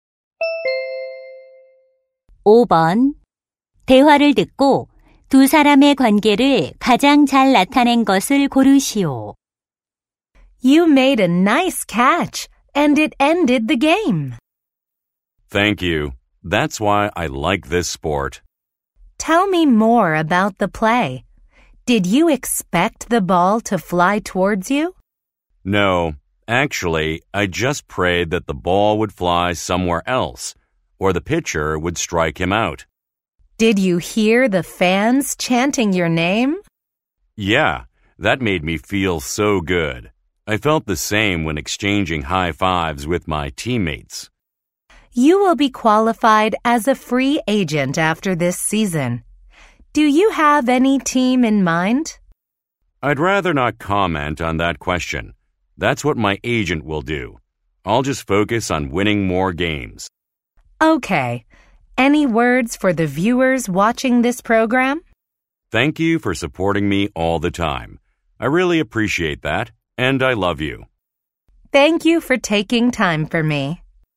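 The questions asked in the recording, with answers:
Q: 대화를 듣고 두 사람의 관계를 가장 잘 나타낸 것을 고르시오.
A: 방송 진행자 - 야구 선수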